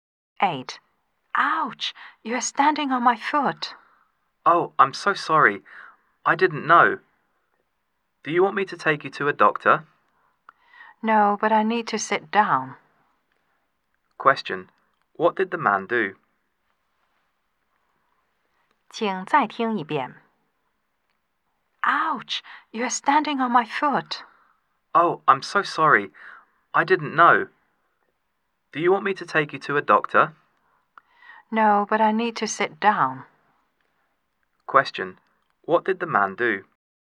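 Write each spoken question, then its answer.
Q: What did the man do?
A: He stood on the woman's foot.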